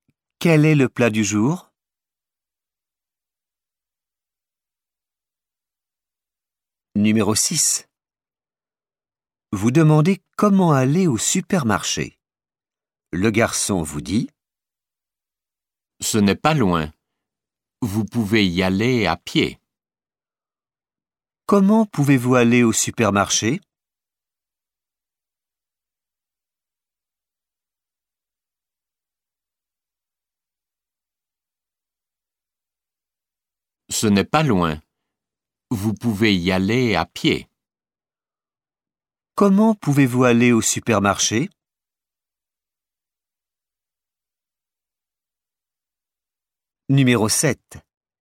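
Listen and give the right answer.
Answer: À pied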